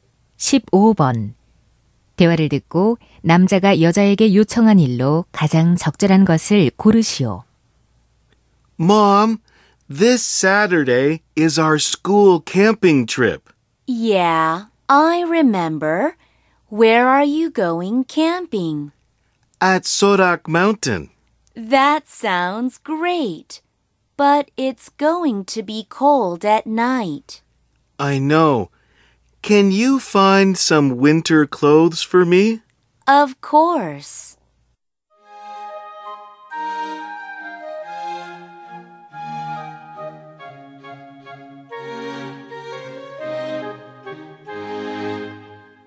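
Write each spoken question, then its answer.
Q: 대화를 듣고 남자가 여자에게 요청한 일로 가장 적절한 것을 고르시오.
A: 겨울옷 찾아 주기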